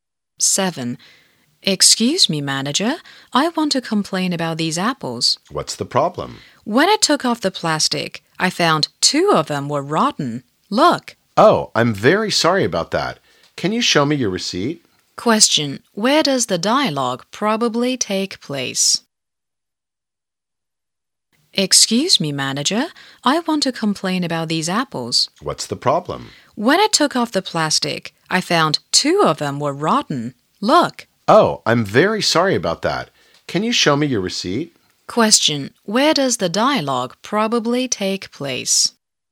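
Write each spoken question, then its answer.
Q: Question. Where does the dialogue probably take place?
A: In a shop/supermarket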